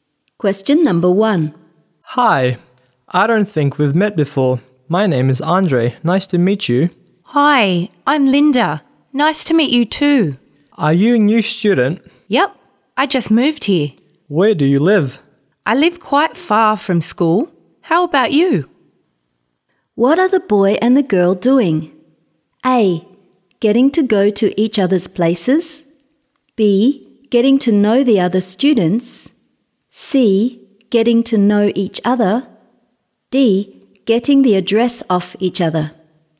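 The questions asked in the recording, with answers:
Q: What are the boy and the girl doing?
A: C: Getting to know each other.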